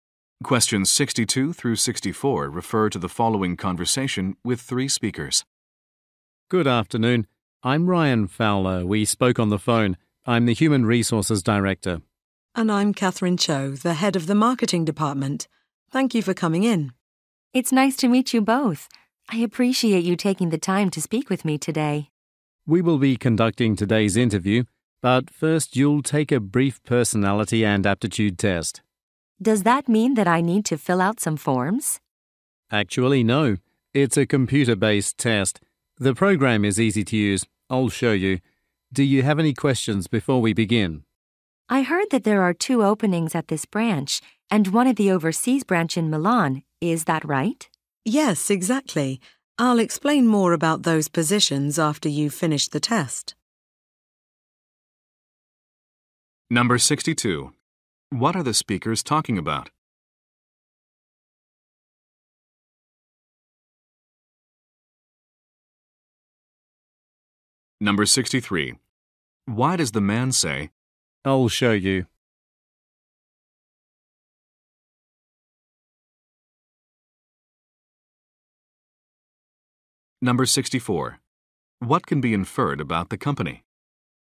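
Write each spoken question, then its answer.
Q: What are the speakers talking about?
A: A job interview

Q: Why does the man say,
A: To demonstrate the computer-based test

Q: What can be inferred about the company?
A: It has an overseas branch in Milan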